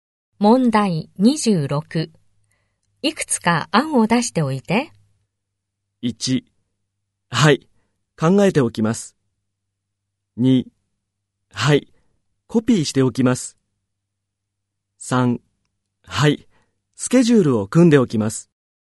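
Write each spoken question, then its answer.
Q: いくつか案を出しておいて。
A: 1: はい、考えておきます。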